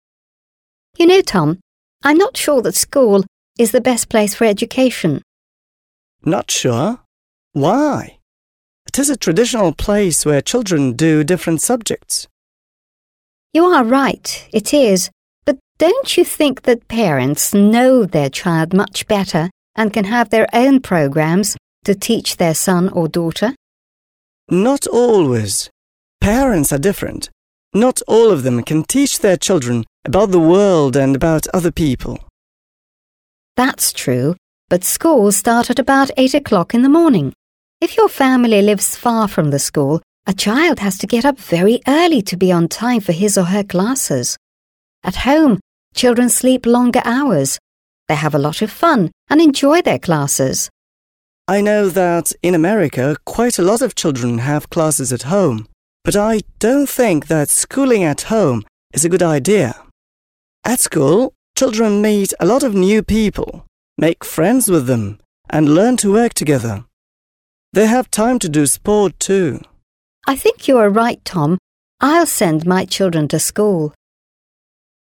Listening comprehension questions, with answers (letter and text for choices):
Listen and complete the sentences.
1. Ann ...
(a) thinks that schools are not the best place to give education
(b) says that children mustn't go to school to get education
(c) is not certain that schools are the best place to give education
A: (c) is not certain that schools are the best place to give education

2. Tom ...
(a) is for school education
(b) says that schooling at home is good for America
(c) is not sure that schools give a good education in America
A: (a) is for school education

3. Ann is sure that parents ...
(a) teach children better than school teachers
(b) know their children better than school teachers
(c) are better friends for children than teachers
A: (b) know their children better than school teachers

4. Tom says that school education is better than home education because ...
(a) children learn to do many things together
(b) boys and girls can sleep a lot in the morning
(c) schools have special programmes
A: (a) children learn to do many things together

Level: 7 класс